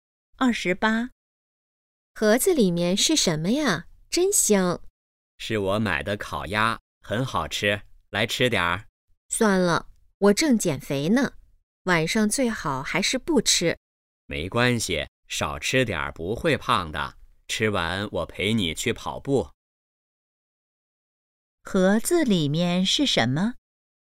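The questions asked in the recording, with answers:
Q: 盒子里面是什么?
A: 烤鸭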